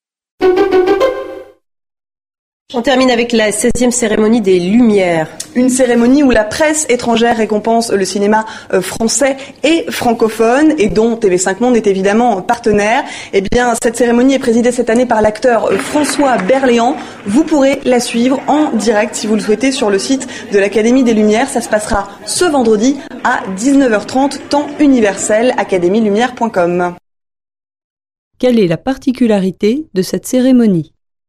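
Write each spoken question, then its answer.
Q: Quelle est la particularité de cette cérémonie ?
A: C'est la presse étrangère qui récompense le cinéma français et francophone.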